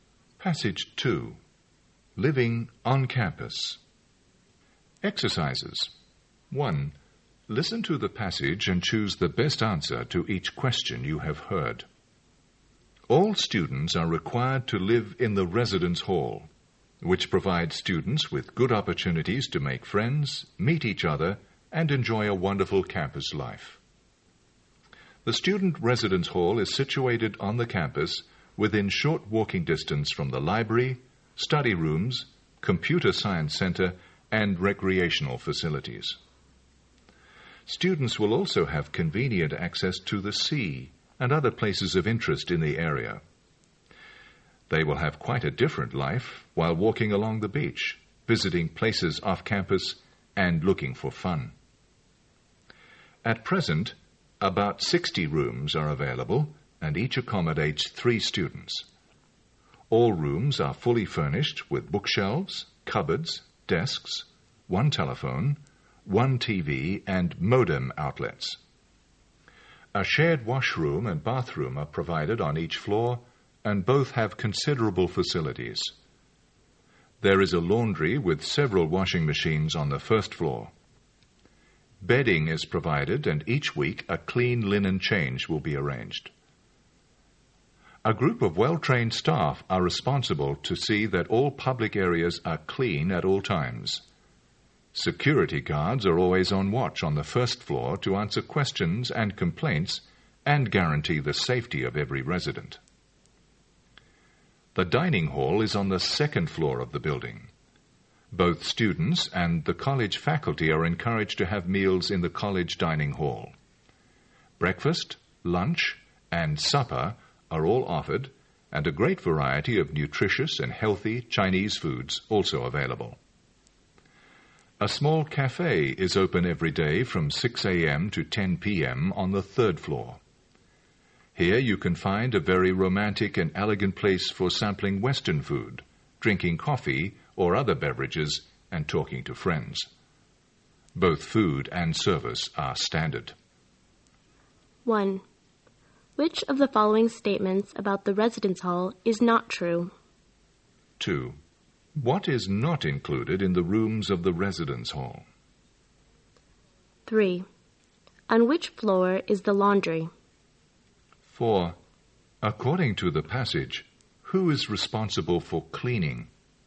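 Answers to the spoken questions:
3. The first floor
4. A group of well-trained staff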